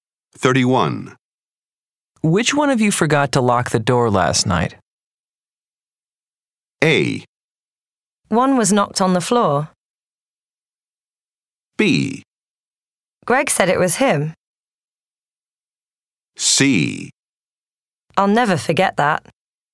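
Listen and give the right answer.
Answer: B: Greg said it was him.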